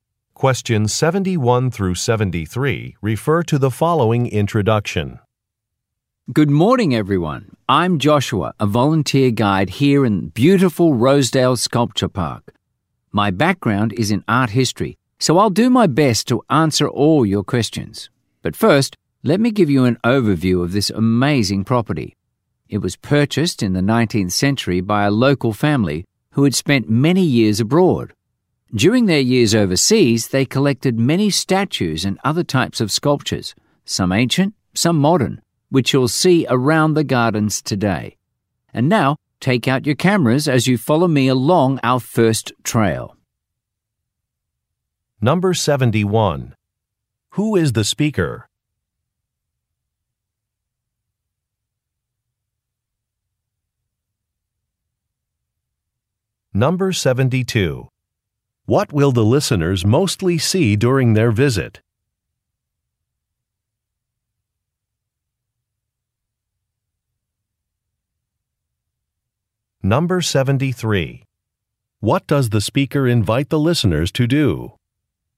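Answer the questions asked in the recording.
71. A volunteer tour guide
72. Sculptures
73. Take photos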